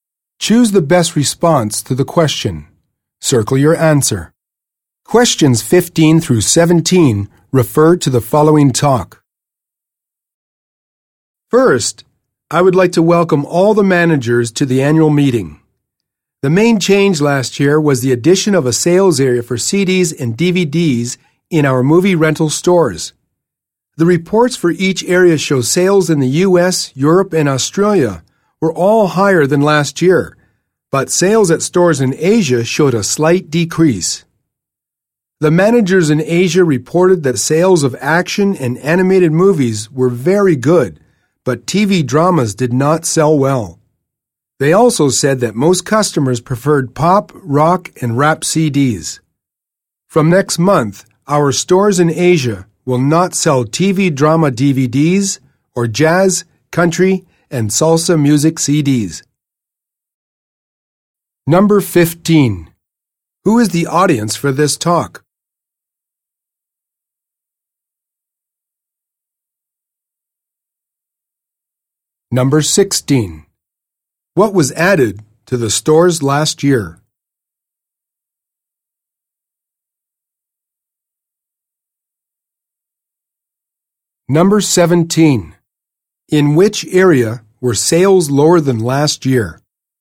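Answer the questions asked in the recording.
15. Store managers
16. A sales area for CDs and DVDs
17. Asia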